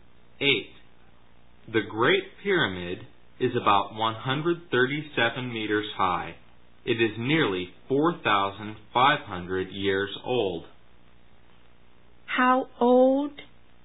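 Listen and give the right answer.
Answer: Nearly 4,500 years old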